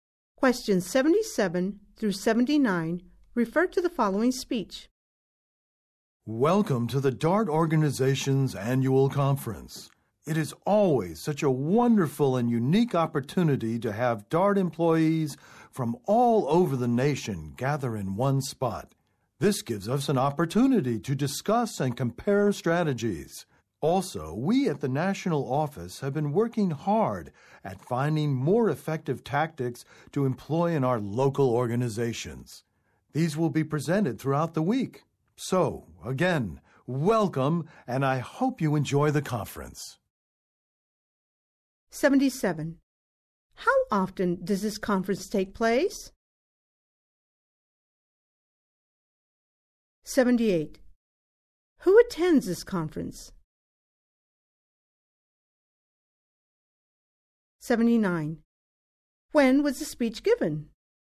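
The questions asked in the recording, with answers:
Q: How often does this conference take place?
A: Once a year

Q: Who attends this conference?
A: DART employees from all over the nation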